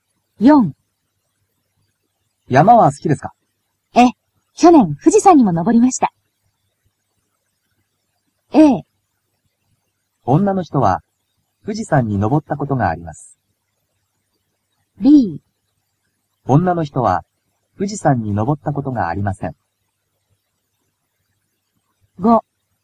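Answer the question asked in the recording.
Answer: A: 女の人は富士山に登ったことがあります。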